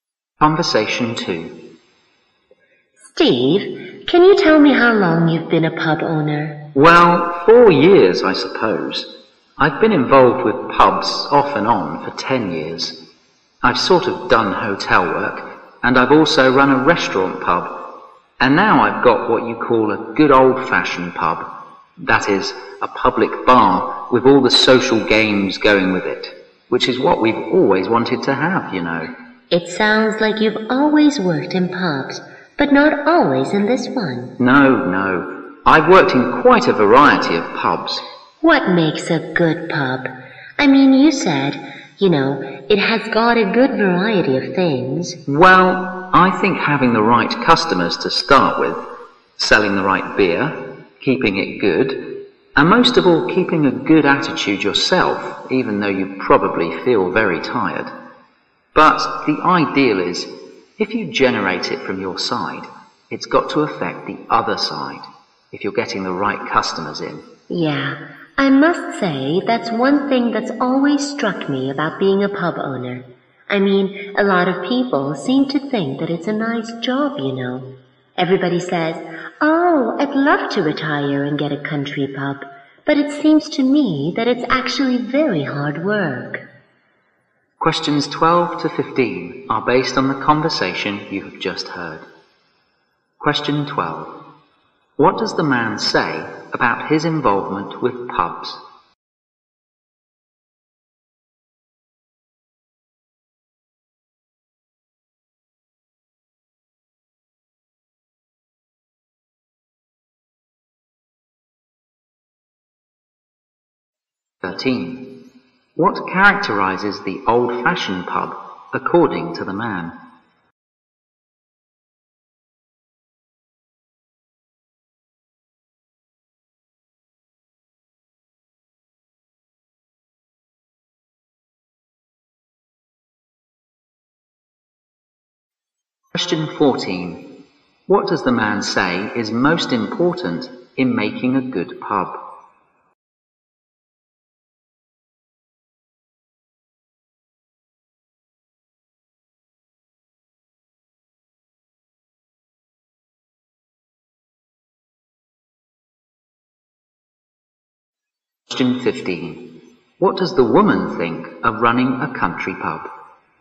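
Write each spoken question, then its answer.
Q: What does the man say about his involvement with pubs?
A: He has worked in many pubs off and on for 10 years

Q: What characterizes the old-fashioned pub, according to the man?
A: A public bar with social games

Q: What does the man say is most important in making a good pub?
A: Keeping a good attitude yourself

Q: What does the woman think of running a country pub?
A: It is very hard work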